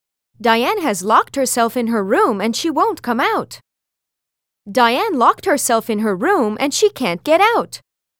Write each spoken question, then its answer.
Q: Diane has locked herself in her room and she won't come out. Diane locked herself in her room and she can't get out.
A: Different is the correct answer.